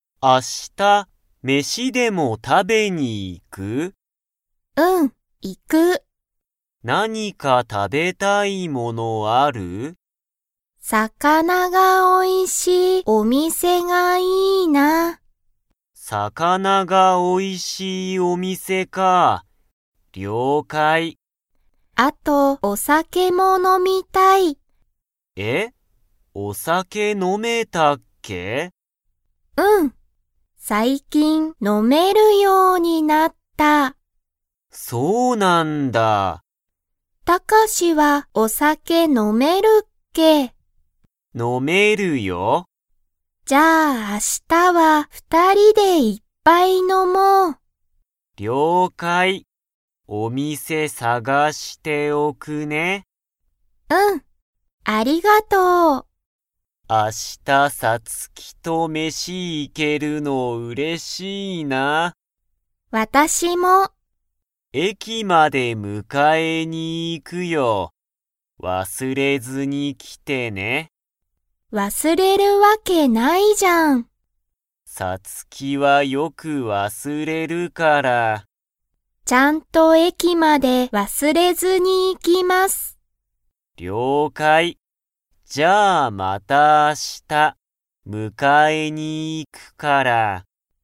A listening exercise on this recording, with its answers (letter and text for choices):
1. さつきはお酒さけを 。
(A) 飲のみたい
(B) 飲のみたくない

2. 明日あした、たかしはどこに迎むかえに行いきますか?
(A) お店みせ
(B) さつきの家いえ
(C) たかしの家いえ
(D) 駅えき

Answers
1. (A) 飲のみたい
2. (D) 駅えき

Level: Level 3